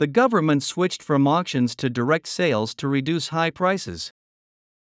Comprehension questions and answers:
( ) to reduce high prices.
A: The government switched from auctions to direct sales

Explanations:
▶ 「auctions(競争入札)」の語尾を聞き落して「auction」と単数にしてしまった。 ⇒ この単語は可算名詞なので、無冠詞・単数にはなりません。また、語尾の[z]をしっかり聞き取りましょう。

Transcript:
The government switched from auctions to direct sales to reduce high prices.